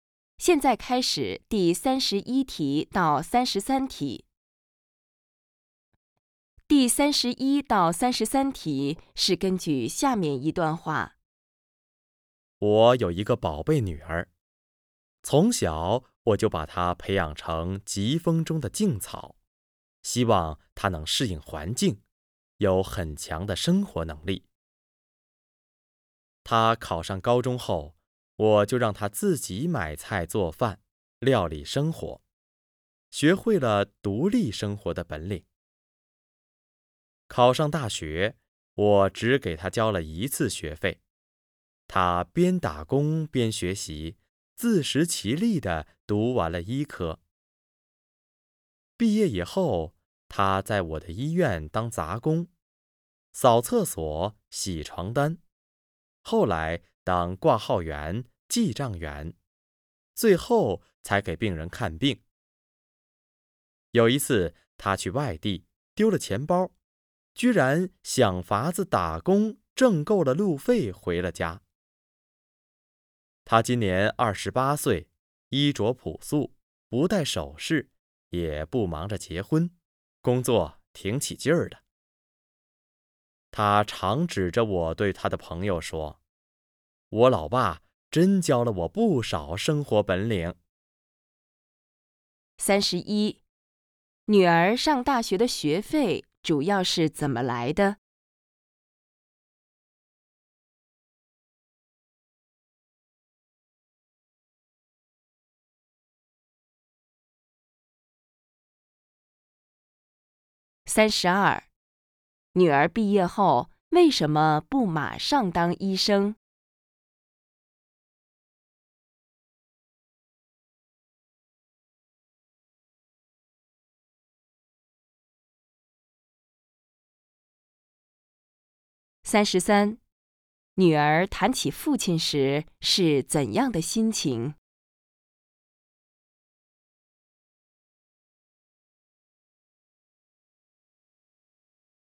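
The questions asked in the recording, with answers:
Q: 女儿上大学的学费主要是怎么来的?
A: 自己打工挣的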